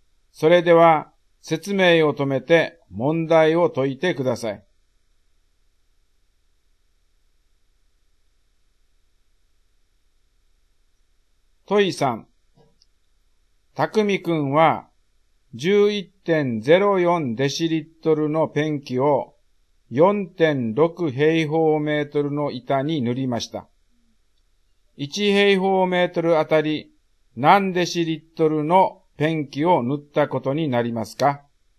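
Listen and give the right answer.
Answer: 2.4デシリットル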